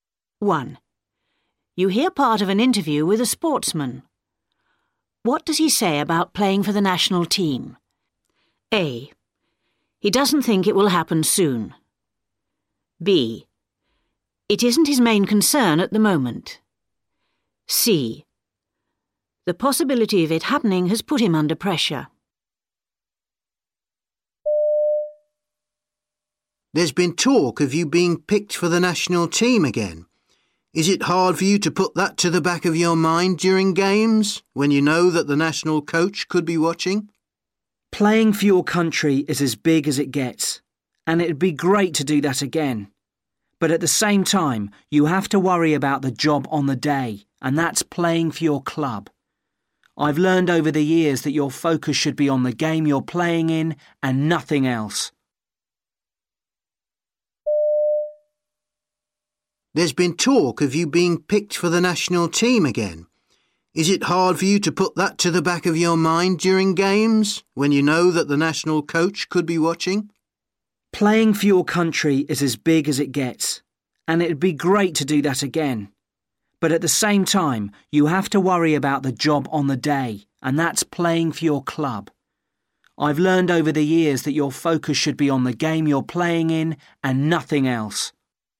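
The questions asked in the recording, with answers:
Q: What does he say about playing for the national team?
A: B: It isn't his main concern at the moment.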